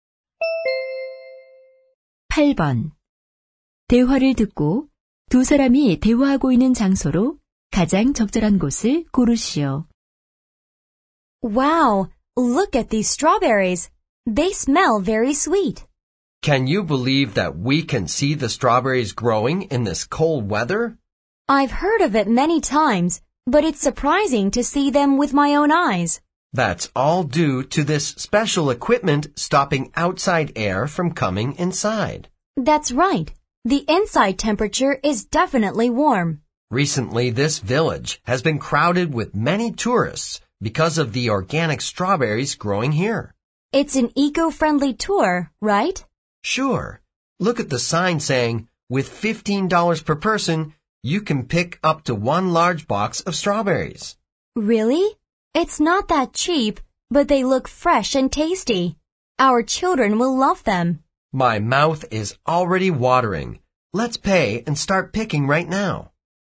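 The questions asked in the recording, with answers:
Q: 대화를 듣고 두 사람이 대화하고 있는 장소로 가장 적절한 곳을 고르시오.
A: 딸기 재배 비닐하우스(농장)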